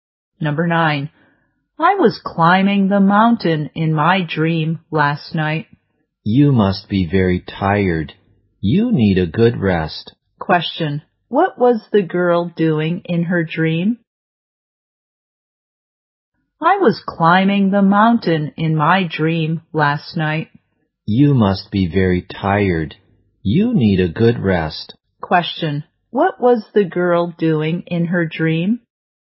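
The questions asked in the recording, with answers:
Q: Question. What was the girl doing in her dream?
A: Climbing the mountain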